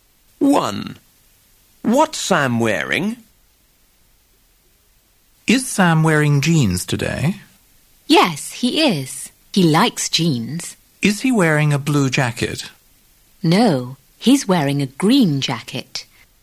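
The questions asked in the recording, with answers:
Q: What's Sam wearing?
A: Jeans and a green jacket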